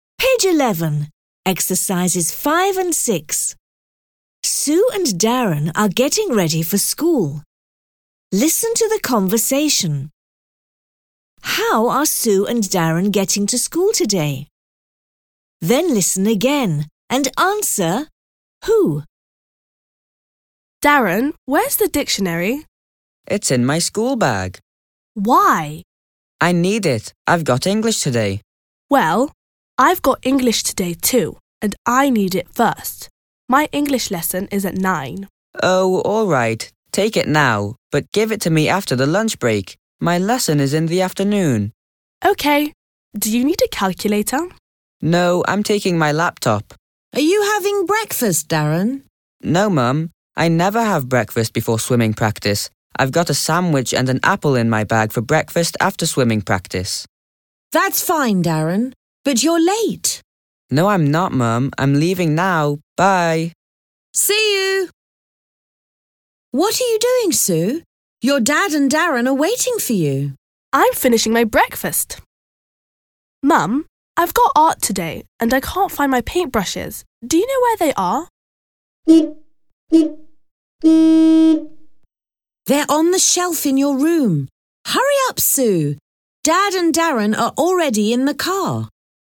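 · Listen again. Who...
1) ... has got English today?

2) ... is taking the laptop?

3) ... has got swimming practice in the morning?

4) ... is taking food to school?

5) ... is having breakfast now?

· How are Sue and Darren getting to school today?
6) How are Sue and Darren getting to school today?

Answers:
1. Sue and Darren
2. Darren
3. Darren
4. Darren
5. Sue
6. By car, with Dad

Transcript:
Sue: Darren, where's the dictionary?
Darren: It's in my schoolbag.
Sue: Why?
Darren: I need it. I've got English today.
Sue: Well, I've got English today, too, and I need it first. My English lesson is at 9.00.
Darren: Oh – all right. Take it now, but give it to me after the lunch break. My lesson is in the afternoon.
Sue: OK. Do you need a calculator?
Darren: No. I'm taking my laptop.
Mum: Are you having breakfast, Darren?
Darren: No, Mum. I never have breakfast before swimming practice. I've got a sandwich and an apple in my bag for breakfast after swimming practice.
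Mum: That's fine, Darren. But, you're late!
Darren: No, I'm not, Mum, I'm leaving now – bye!
Mum: See you! What are you doing, Sue? Your dad and Darren are waiting for you.
Sue: I'm finishing my breakfast. Mum, I've got art today and I can't find my paintbrushes. Do you know where they are?
Mum: They're on the shelf in your room. Hurry up, Sue! Dad and Darren are already in the car.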